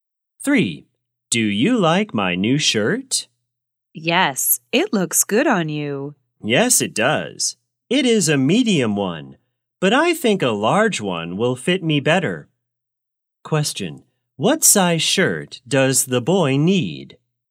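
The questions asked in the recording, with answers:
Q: What size shirt does the boy need?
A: A large one.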